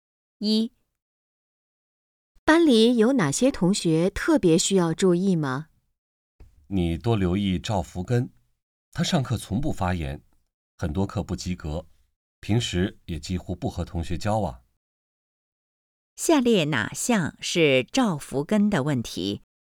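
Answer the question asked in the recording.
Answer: 上课从不发言,很多课不及格,几乎不和同学交往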